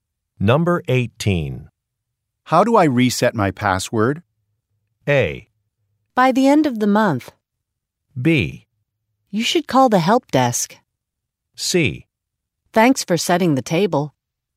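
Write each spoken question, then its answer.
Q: How do I reset my password?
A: B: You should call the help desk.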